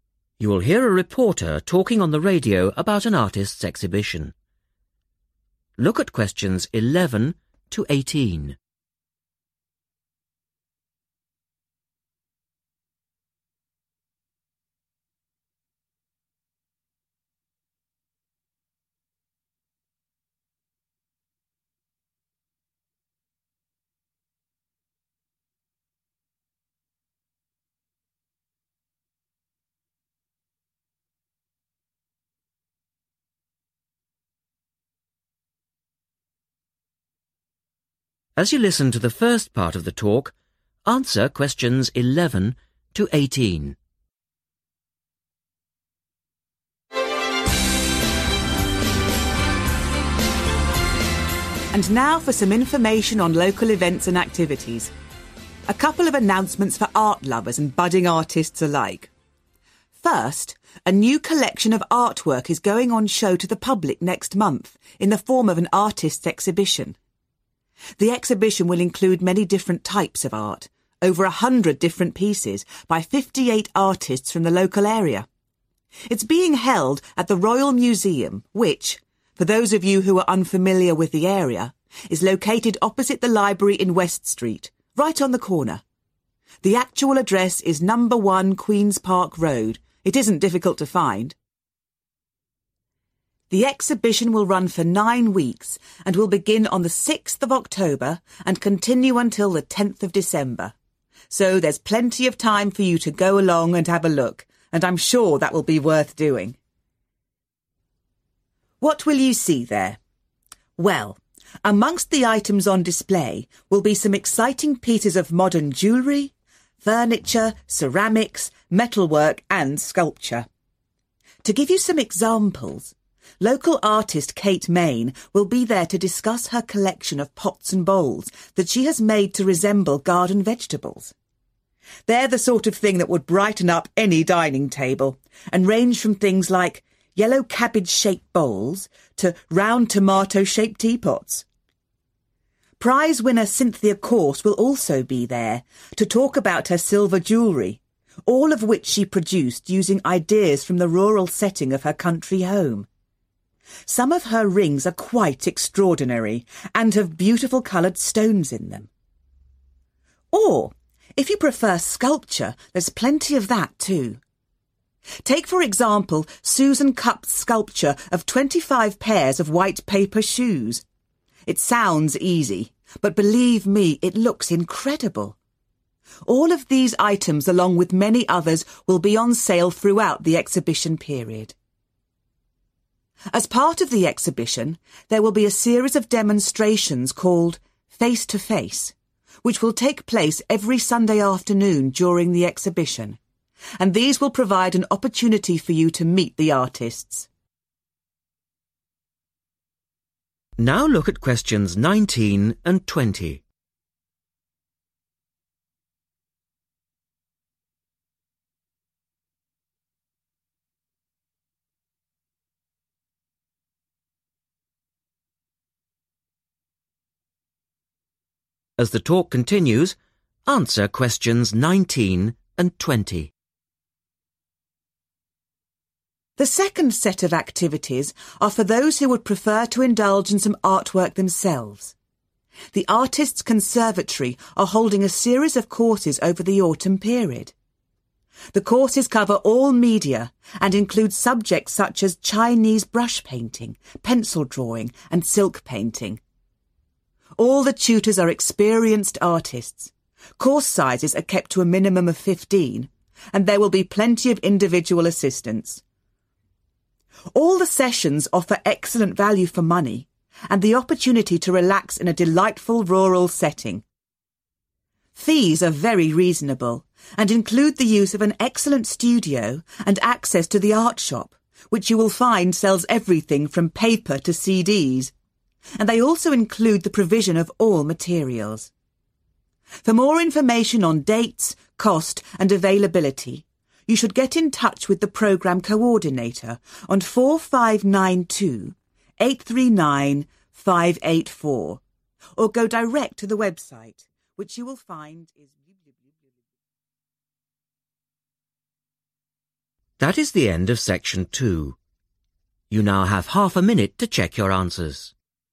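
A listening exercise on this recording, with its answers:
Complete the notes below Write NO MORE THAN THREE WORDS AND/OR A NUMBER for each answer.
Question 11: Venue: 11.................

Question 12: No. 1 12...................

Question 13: Dates: 6th October — 13..............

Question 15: › crockery in the shape of 15...............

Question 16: › silver jewellery, e.g. large rings containing 16...............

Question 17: › a shoe sculpture made out of 17..............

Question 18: Visit demonstrations called 18...............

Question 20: - Supply of 20...............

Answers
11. Royal Museum
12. Queen's Park Road
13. 10th December
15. garden vegetables
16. coloured stones
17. white paper
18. Face to Face
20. all materials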